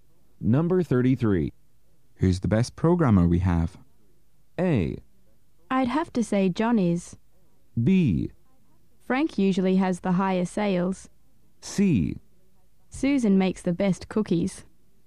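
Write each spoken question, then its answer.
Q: Who's the best programmer we have?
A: A: I'd have to say John is.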